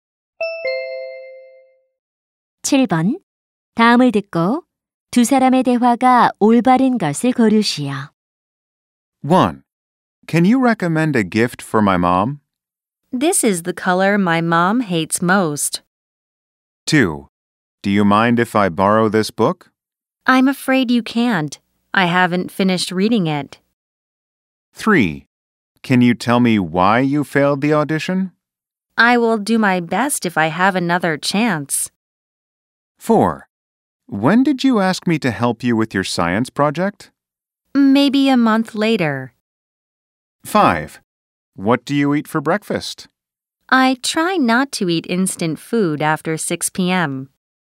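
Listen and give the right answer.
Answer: 2: Do you mind if I borrow this book? / I'm afraid you can't. I haven't finished reading it.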